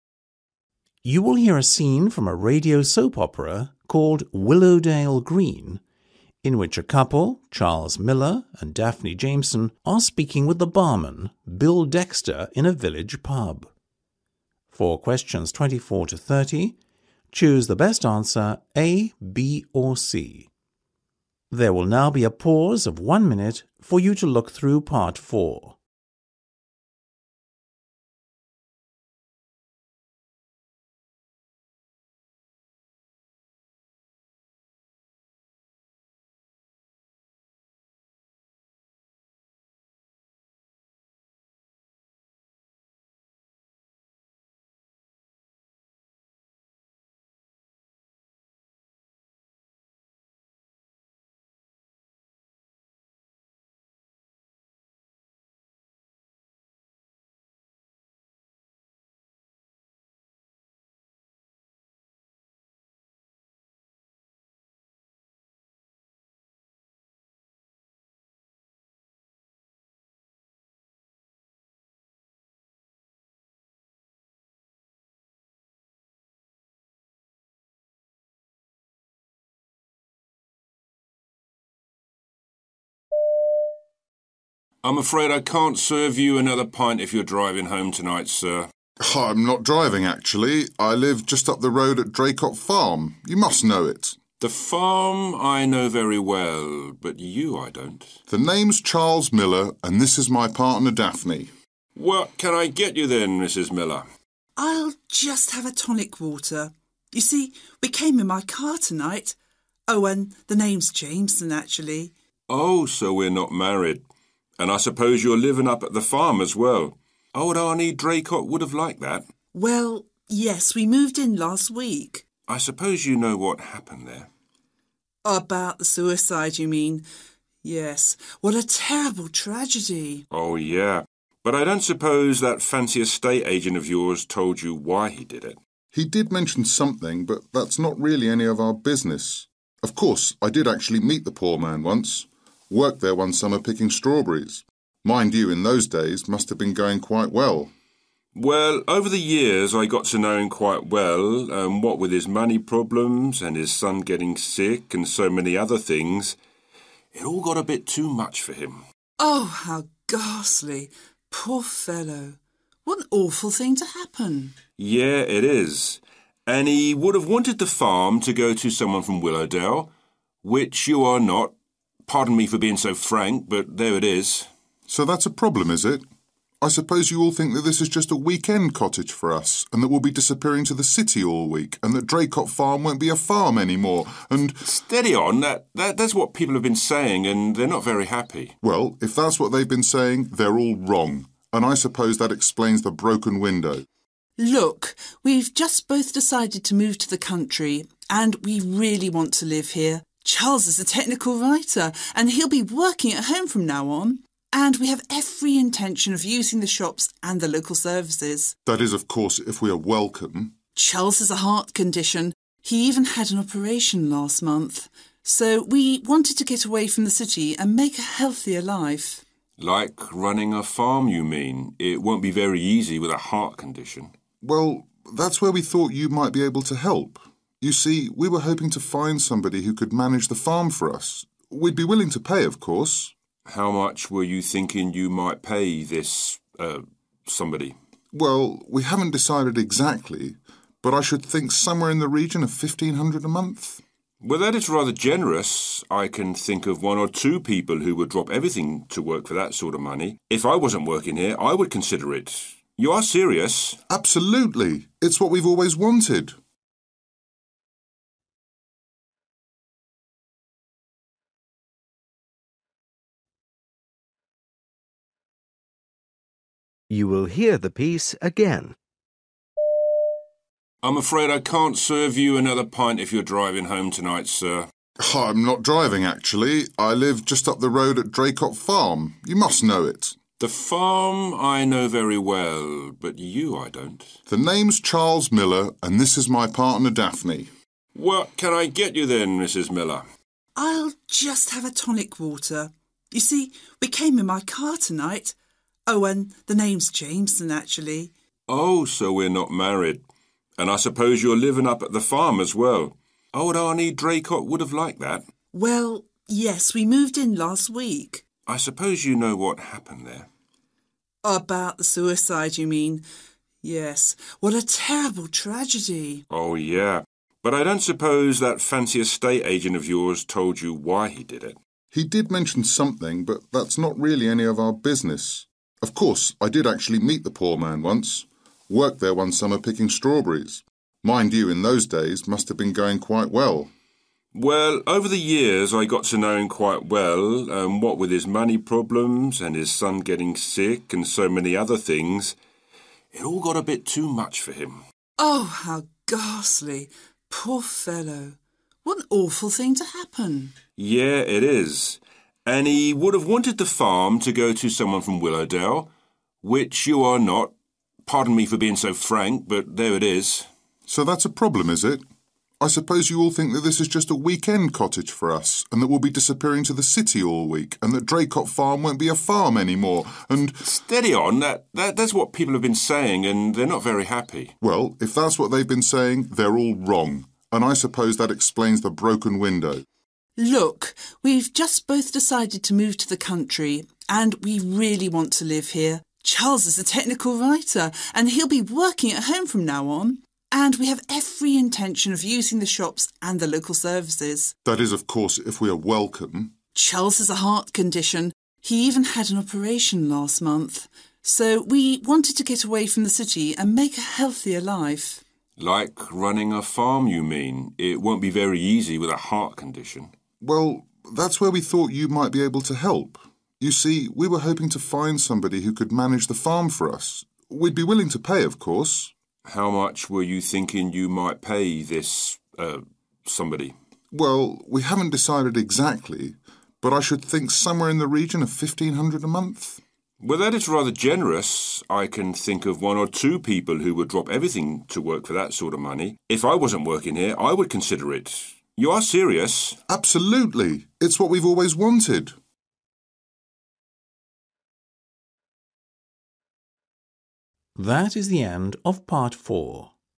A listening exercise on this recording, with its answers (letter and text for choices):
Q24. The man working at the bar presumes that Charles and Daphne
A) are locals.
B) are married.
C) live at Draycott farm.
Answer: B) are married.

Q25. How well did Charles know Andy Draycott?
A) He never met him.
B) They were close relatives.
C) He didn't know him well.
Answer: C) He didn't know him well.

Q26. What happened to the previous owner of the farm?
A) He died.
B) He sold it.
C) He left.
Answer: A) He died.

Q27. Bill says the couple should not have the farm because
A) they are not from Willowdale.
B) the owner committed suicide.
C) they are not frank.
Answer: A) they are not from Willowdale.

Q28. What have people been saying, according to Bill?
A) Charles and Daphne are bad people.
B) The farm will not be maintained as a farm going forward.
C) Charles and Daphne did not inherit the farm.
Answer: B) The farm will not be maintained as a farm going forward.

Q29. What motivated Charles and Daphne to move to the country?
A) a healthier life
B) Charles' work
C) the local services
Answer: A) a healthier life

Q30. How does Bill's attitude change at the end of the conversation?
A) He becomes suspicious.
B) He regrets his previous attitude.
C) He becomes more positive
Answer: C) He becomes more positive

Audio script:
B: I'm afraid I can't serve you another pint if you're driving home tonight, sir.
C: I'm not driving, actually. I live just up the road at Draycott farm – you must know it.
B: The Farm – I know very well ... but you, I don't.
C: The name's Charles Miller, and this is my partner Daphne.
B: What can I get you then, Mrs Miller?
D: I'll just have a tonic water – you see we came in my car tonight – oh, and the name's Jameson, actually.
B: Oh, so we're not married. And I suppose you're living up at the farm, as well. Old Arnie Draycott would've liked that.
D: Well, yes, we moved in last week.
B: I suppose you know what happened there.
D: About the suicide you mean? Yes. What a terrible tragedy.
B: Oh yeah ... but I don't suppose that fancy estate agent of yours told you why he did it.
C: He did mention something but that's not really any of our business. Of course, I did actually meet the poor man once – worked there one summer picking strawberries. Mind you, in those days things must have been going quite well.
B: Well, over the years, I got to know him quite well and what with his money problems and his son getting sick and so many other things ... it all got too much for him.
D: Oh, how ghastly! Poor fellow! What an awful thing to happen.
B: Yeah, it is ... and he would have wanted the farm to go to someone from Willowdale ... which you are not. Pardon me for being so frank – but there it is.
C: So that's a problem, is it? I suppose you all think that this is just a weekend cottage for us ... and that we'll be disappearing to the city all week and that Draycott farm won't be a farm any more and ...
B: Steady on. That is what people have been saying ... and they're not very happy.
C: Well, if that's what they've been saying, they're all wrong ... And, I suppose that explains the broken window.
D: Look, we've just both decided to move to the country ... and we really want to live here. Charles is a technical writer and he'll be working at home from now on ... and we have every intention of using the shops and the local services.
C: That is, of course, if we are welcome.
D: Charles has a heart condition. He even had an operation last month. So we wanted to get away from the city and make a healthier life.
B: Like running a farm you mean. It won't be very easy with a heart condition.
C: Well, that's where we thought you might be able to help. You see, we were hoping to find somebody who could manage the farm for us, ... we'd be willing to pay of course.
B: How much were you thinking you might pay this ... er ... somebody?
C: Well, we haven't decided exactly but I should think somewhere in the region of fifteen hundred a month.
B: Well, that is rather generous. I can think of one or two people who would drop everything to work for that sort of money. If I wasn't working here, I would consider it. You are serious?
C: Absolutely! ... It's what we've always wanted.